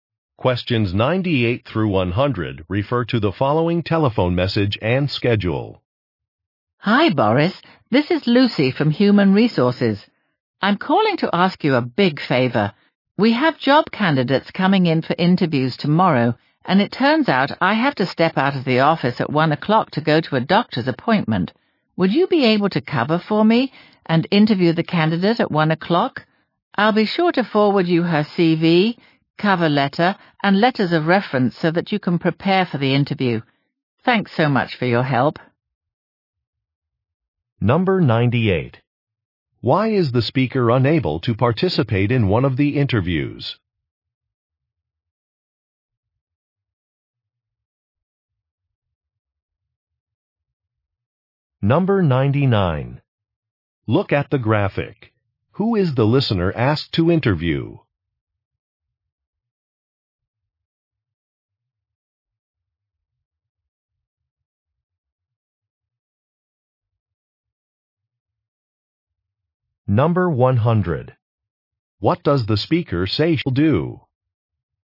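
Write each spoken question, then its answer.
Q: Why is the speaker unable to participate in one of the interviews?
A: She has a doctor's appointment

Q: What does the speaker say she'll do?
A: Forward the candidate's CV, cover letter and references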